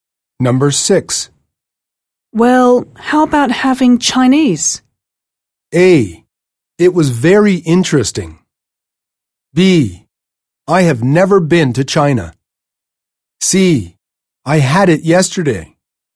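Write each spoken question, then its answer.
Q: Well, how about having Chinese?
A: C: I had it yesterday.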